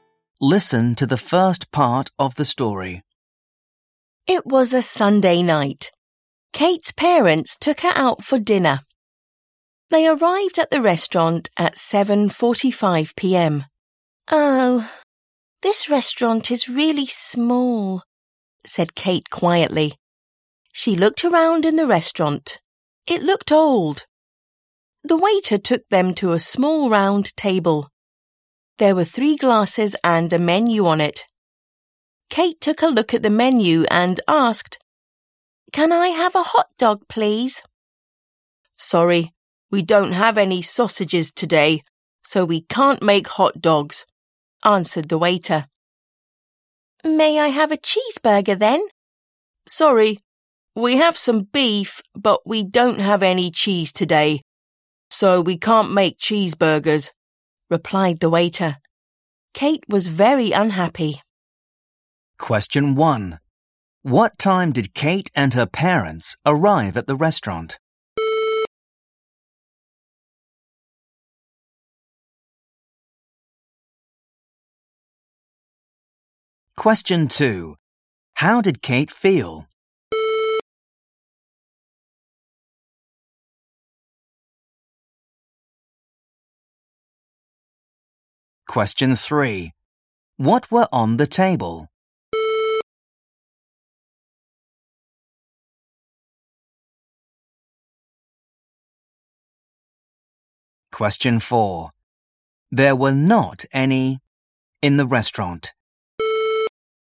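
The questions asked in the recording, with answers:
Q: What time did Kate and her parents arrive at the restaurant?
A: At 7:45 p.m.

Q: How did Kate feel?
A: Very unhappy

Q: What were on the table?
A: Three glasses and a menu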